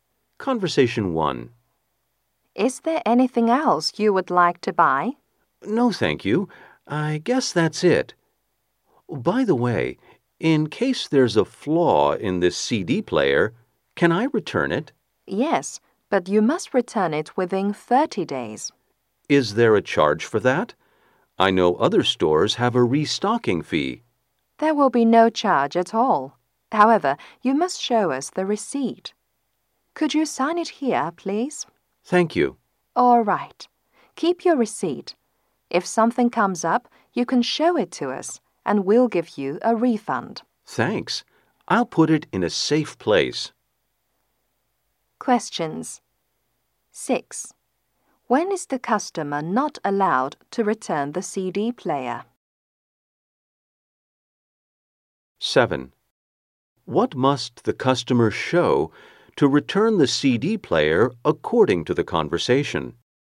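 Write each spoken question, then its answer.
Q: When is the customer not allowed to return the CD player?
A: After 30 days

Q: What must the customer show to return the CD player according to the conversation?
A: The receipt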